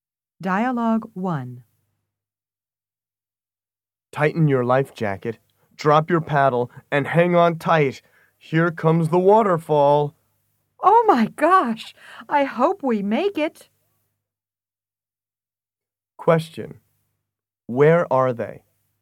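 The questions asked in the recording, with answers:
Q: Where are they?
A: On a river in a boat (rafting), approaching a waterfall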